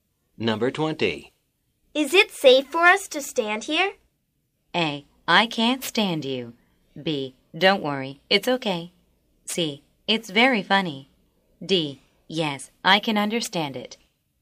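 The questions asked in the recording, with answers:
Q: Is it safe for us to stand here?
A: B: Don't worry, it's okay.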